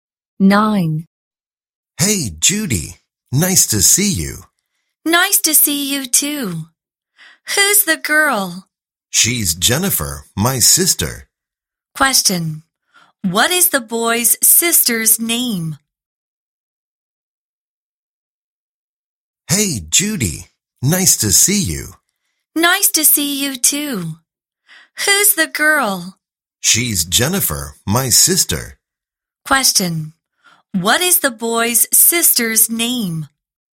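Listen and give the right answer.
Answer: Jennifer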